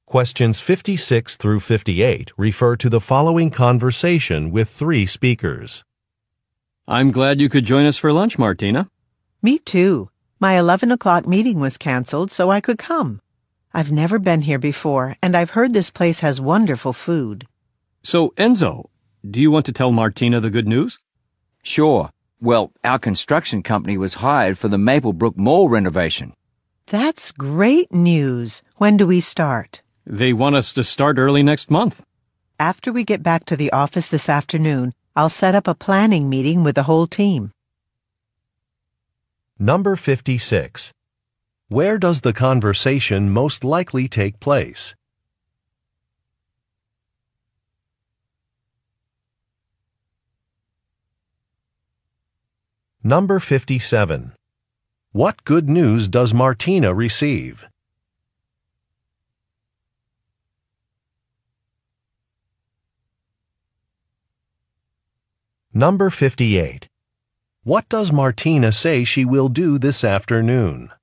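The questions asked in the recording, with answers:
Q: Where does the conversation most likely take place?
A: At a restaurant

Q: What good news does Martina receive?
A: Their construction company was hired for the Maplebrook Mall renovation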